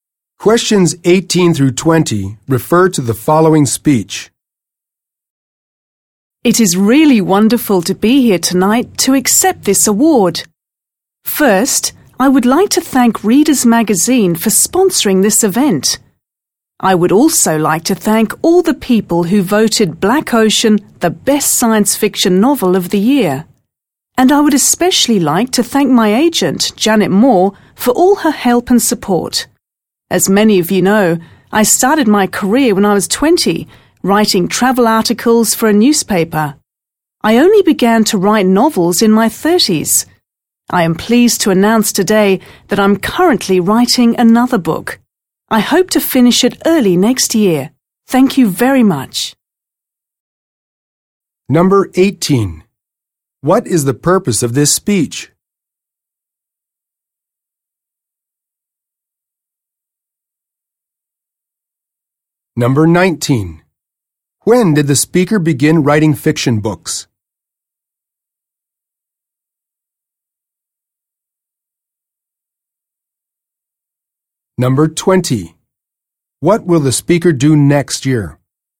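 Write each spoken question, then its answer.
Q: What is the purpose of this speech?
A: To accept an award

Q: When did the speaker begin writing fiction books?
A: In their 30s

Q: What will the speaker do next year?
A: Finish a new book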